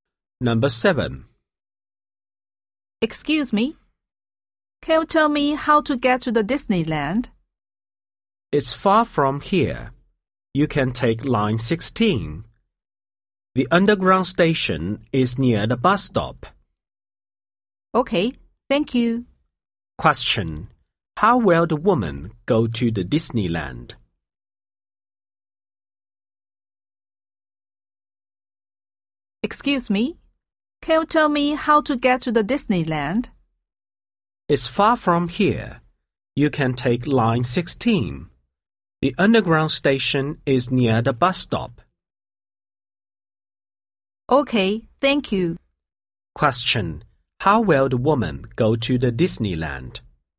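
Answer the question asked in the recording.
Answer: By underground (Line 16)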